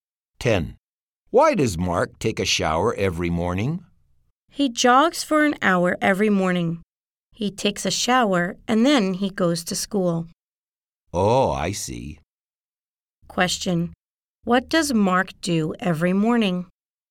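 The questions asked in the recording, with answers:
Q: Question. What does Mark do every morning?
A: He jogs for an hour, takes a shower, and goes to school.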